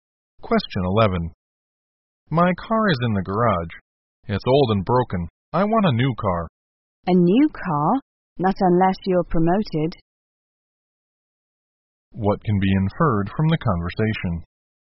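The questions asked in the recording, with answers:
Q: What can be inferred from the conversation?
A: The speaker won't get a new car unless he is promoted.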